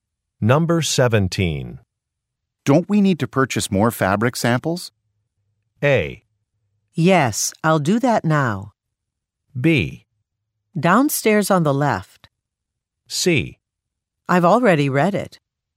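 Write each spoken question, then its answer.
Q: Don't we need to purchase more fabric samples?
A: A: Yes, I'll do that now.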